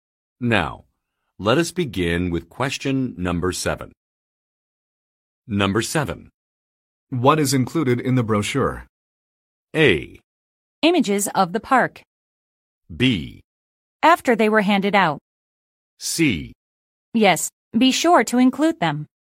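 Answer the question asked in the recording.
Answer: Images of the park.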